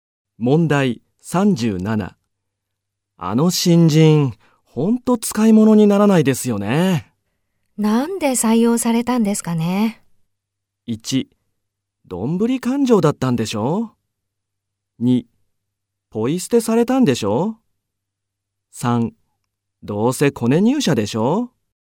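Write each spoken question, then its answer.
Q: あの新人、ほんと使い物にならないですよね。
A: 3: どうせコネ入社でしょ?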